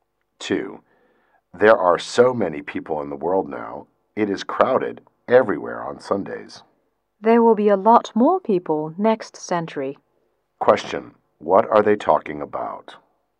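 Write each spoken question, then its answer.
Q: What are they talking about?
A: The world's large population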